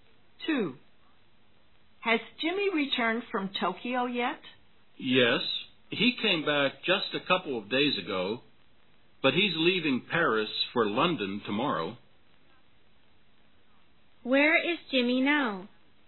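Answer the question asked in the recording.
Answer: In Paris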